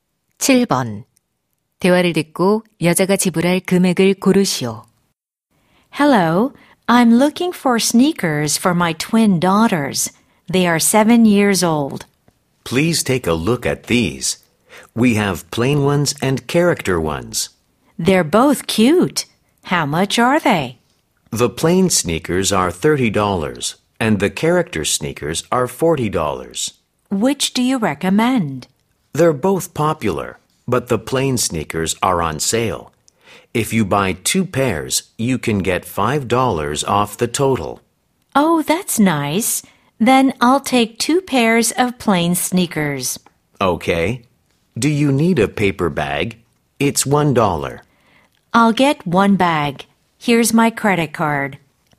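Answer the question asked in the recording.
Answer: $56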